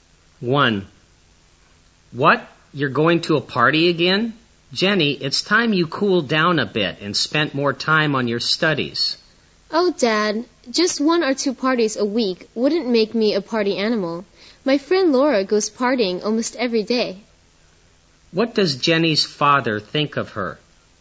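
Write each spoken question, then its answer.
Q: What does Jenny's father think of her?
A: He thinks she goes to too many parties and should spend more time on her studies.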